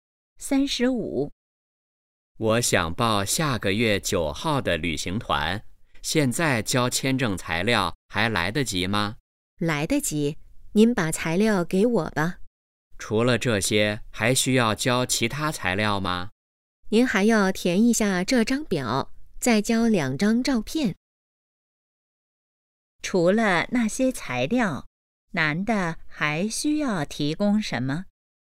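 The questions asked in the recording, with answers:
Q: 除了那些材料,男的还需要提供什么?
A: 填表,交2张照片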